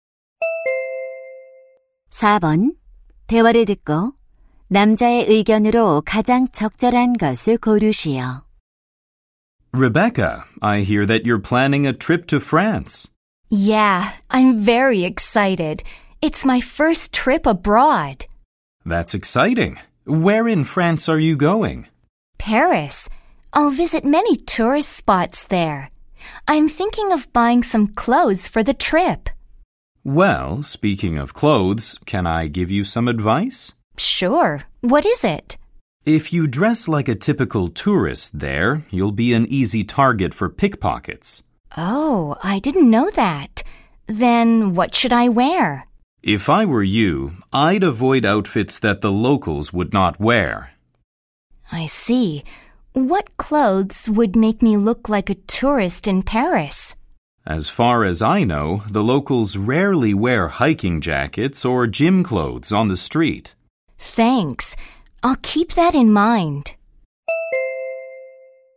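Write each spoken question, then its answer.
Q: 대화를 듣고 남자의 의견으로 가장 적절한 것을 고르시오.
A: 여행지에서는 관광객처럼 보이는 옷차림을 피해야 소매치기를 당하지 않는다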